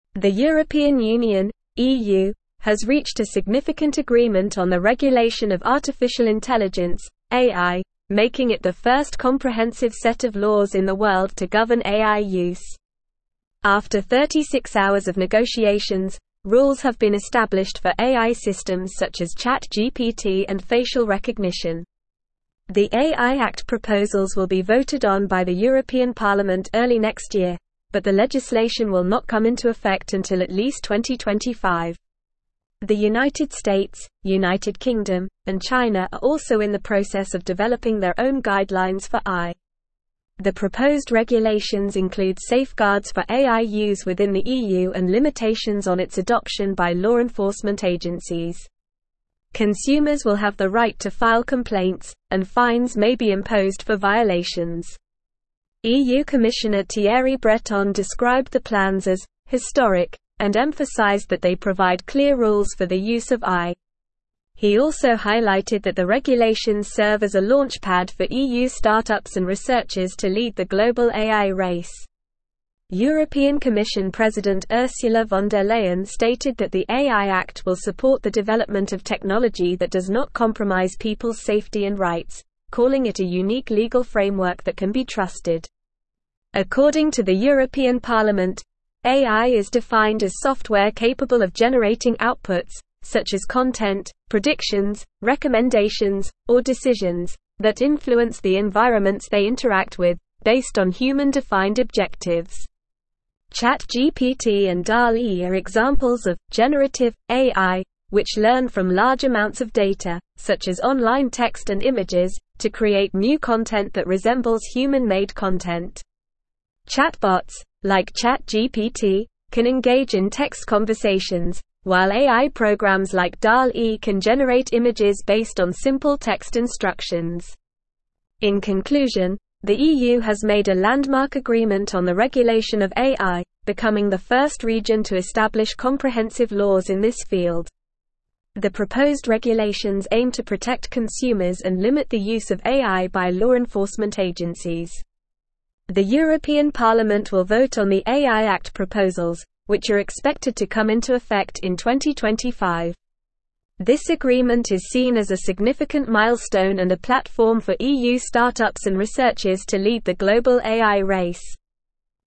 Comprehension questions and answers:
Listen and Fill in the Gaps:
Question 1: The European (1)______ (EU) has reached a significant (2)______ on the regulation of artificial intelligence (AI), making it the first comprehensive set of laws in the world to govern AI use.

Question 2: The European (1)______ (EU) has reached a significant (2)______ on the regulation of artificial intelligence (AI), making it the first comprehensive set of laws in the world to govern AI use.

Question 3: The United (3)______, United Kingdom, and China are also in the process of developing their own (4)______ for AI.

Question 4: The United (3)______, United Kingdom, and China are also in the process of developing their own (4)______ for AI.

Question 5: The proposed regulations include safeguards for AI use within the EU and (5)______ on its adoption by law enforcement agencies.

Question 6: Consumers will have the right to file complaints, and fines may be (6)______ for (7)______.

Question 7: Consumers will have the right to file complaints, and fines may be (6)______ for (7)______.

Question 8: He also (8)______ that the regulations serve as a launch pad for EU start-ups and researchers to lead the global AI race.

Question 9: European Commission President Ursula von der Leyen stated that the AI Act will support the development of technology that does not compromise people's (9)______ and rights, calling it a unique legal framework that can be trusted.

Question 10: According to the European Parliament, AI is defined as software capable of generating outputs, such as (10)______, predictions, recommendations, or decisions, that influence the environments they interact with, based on human-defined objectives.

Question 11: (11)______ and DALL-E are examples of "generative" AI, which (12)______ from large amounts of data, such as online text and images, to create new content that resembles human-made content.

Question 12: (11)______ and DALL-E are examples of "generative" AI, which (12)______ from large amounts of data, such as online text and images, to create new content that resembles human-made content.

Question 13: Chatbots, like ChatGPT, can engage in text conversations, while AI programs like DALL-E can (13)______ images based on (14)______ text instructions.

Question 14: Chatbots, like ChatGPT, can engage in text conversations, while AI programs like DALL-E can (13)______ images based on (14)______ text instructions.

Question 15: The (15)______ regulations aim to protect consumers and limit the use of AI by law enforcement agencies.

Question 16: This agreement is seen as a significant milestone and a (16)______ for EU start-ups and researchers to lead the global AI race.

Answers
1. Union
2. agreement
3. States
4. guidelines
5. limitations
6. imposed
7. violations
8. highlighted
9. safety
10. content
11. ChatGPT
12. learn
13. generate
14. simple
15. proposed
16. platform

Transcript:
The European Union (EU) has reached a significant agreement on the regulation of artificial intelligence (AI), making it the first comprehensive set of laws in the world to govern AI use. After 36 hours of negotiations, rules have been established for AI systems such as ChatGPT and facial recognition. The AI Act proposals will be voted on by the European Parliament early next year, but the legislation will not come into effect until at least 2025. The United States, United Kingdom, and China are also in the process of developing their own guidelines for AI.
The proposed regulations include safeguards for AI use within the EU and limitations on its adoption by law enforcement agencies. Consumers will have the right to file complaints, and fines may be imposed for violations. EU Commissioner Thierry Breton described the plans as "historic" and emphasized that they provide clear rules for the use of AI. He also highlighted that the regulations serve as a launch pad for EU start-ups and researchers to lead the global AI race. European Commission President Ursula von der Leyen stated that the AI Act will support the development of technology that does not compromise people's safety and rights, calling it a unique legal framework that can be trusted.
According to the European Parliament, AI is defined as software capable of generating outputs, such as content, predictions, recommendations, or decisions, that influence the environments they interact with, based on human-defined objectives. ChatGPT and DALL-E are examples of "generative" AI, which learn from large amounts of data, such as online text and images, to create new content that resembles human-made content. Chatbots, like ChatGPT, can engage in text conversations, while AI programs like DALL-E can generate images based on simple text instructions.
In conclusion, the EU has made a landmark agreement on the regulation of AI, becoming the first region to establish comprehensive laws in this field. The proposed regulations aim to protect consumers and limit the use of AI by law enforcement agencies. The European Parliament will vote on the AI Act proposals, which are expected to come into effect in 2025. This agreement is seen as a significant milestone and a platform for EU start-ups and researchers to lead the global AI race.

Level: Level 4